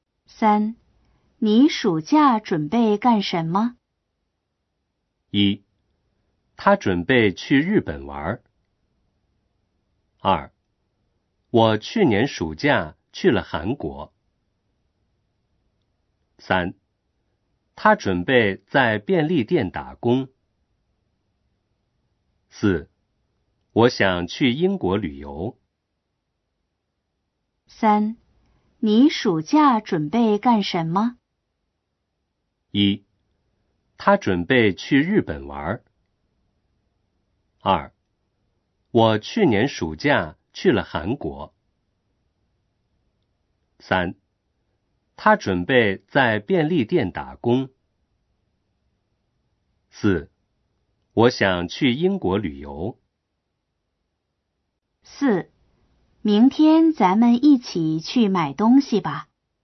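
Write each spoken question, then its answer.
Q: 你暑假准备干什么?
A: 四: 我想去英国旅游。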